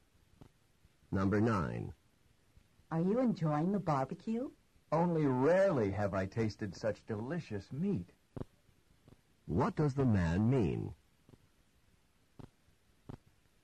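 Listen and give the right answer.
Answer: The meat is unusually delicious.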